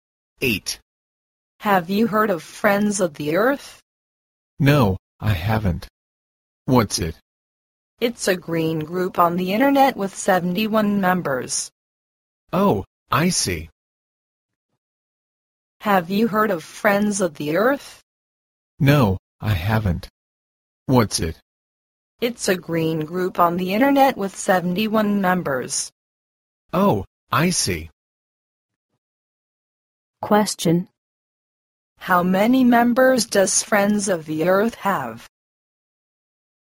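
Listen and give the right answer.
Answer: 71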